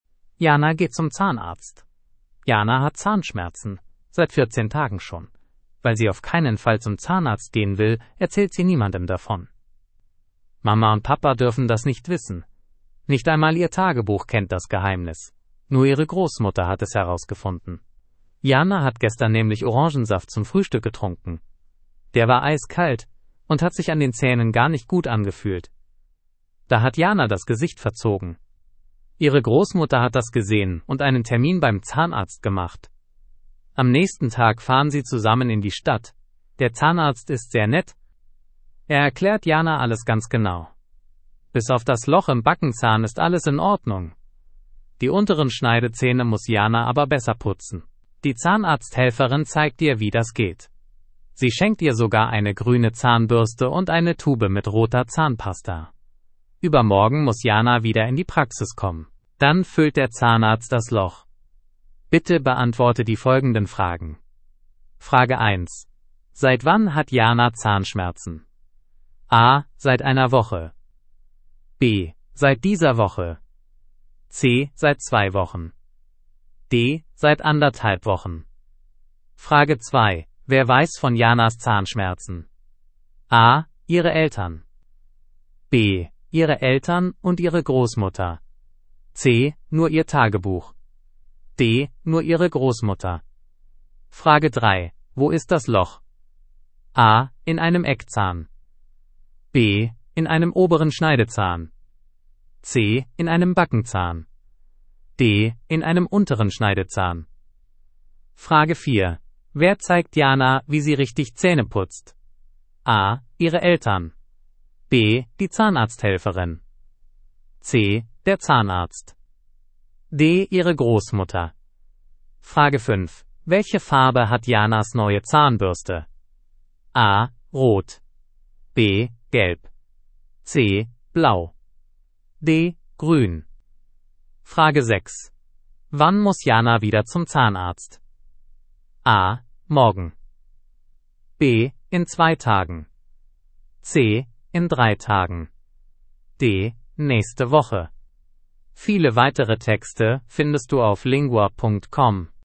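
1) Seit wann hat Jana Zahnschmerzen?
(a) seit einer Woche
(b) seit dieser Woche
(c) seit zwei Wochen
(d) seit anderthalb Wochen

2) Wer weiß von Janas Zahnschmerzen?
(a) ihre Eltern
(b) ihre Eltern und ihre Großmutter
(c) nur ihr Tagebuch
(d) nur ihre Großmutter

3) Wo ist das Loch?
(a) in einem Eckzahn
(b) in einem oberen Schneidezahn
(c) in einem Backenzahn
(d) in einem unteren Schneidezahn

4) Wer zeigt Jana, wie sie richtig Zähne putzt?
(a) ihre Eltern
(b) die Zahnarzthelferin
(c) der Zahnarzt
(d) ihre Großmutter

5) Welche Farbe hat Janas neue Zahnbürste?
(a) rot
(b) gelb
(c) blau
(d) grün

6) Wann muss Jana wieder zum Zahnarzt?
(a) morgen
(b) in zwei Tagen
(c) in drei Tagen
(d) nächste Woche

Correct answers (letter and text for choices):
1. (c) seit zwei Wochen
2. (d) nur ihre Großmutter
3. (c) in einem Backenzahn
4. (b) die Zahnarzthelferin
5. (d) grün
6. (b) in zwei Tagen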